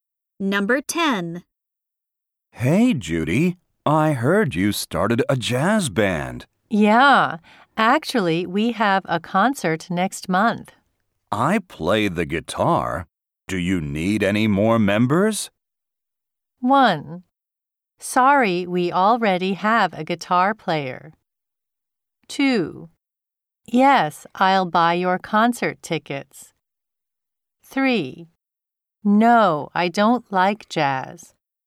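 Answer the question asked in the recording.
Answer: 1: Sorry, we already have a guitar player.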